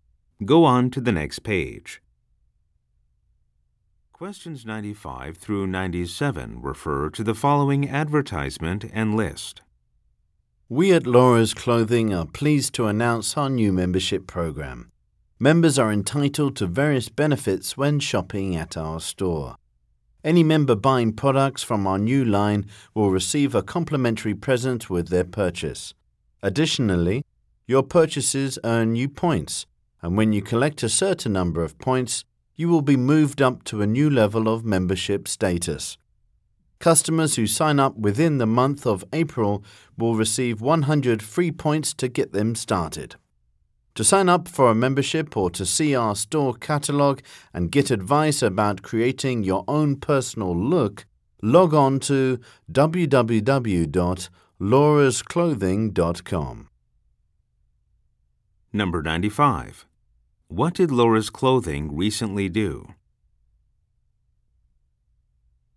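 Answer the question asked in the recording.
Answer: Launched a new membership program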